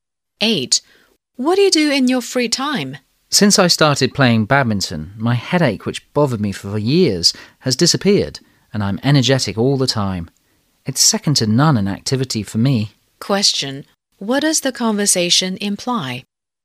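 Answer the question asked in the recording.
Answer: Badminton is the speaker's favourite activity and has improved his health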